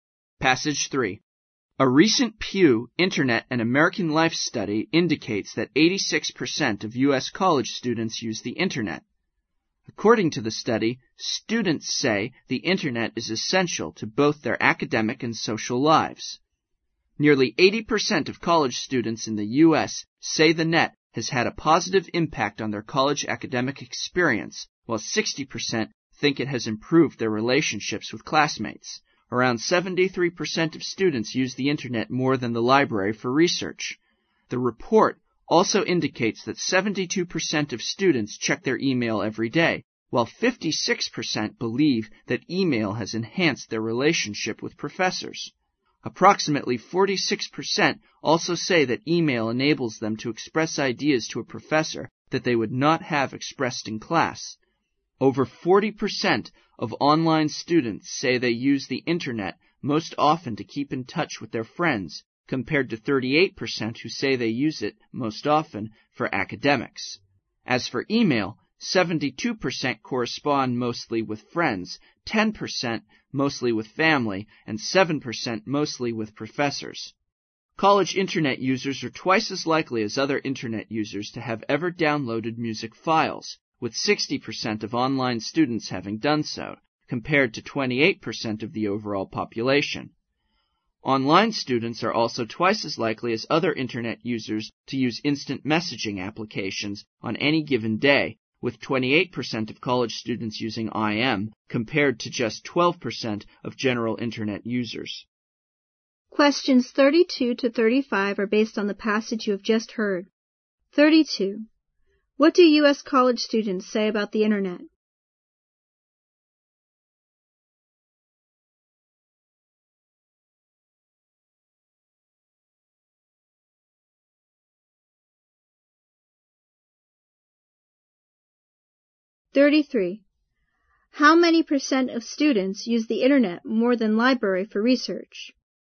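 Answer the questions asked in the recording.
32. It is essential to both their academic and social lives.
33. About 73%.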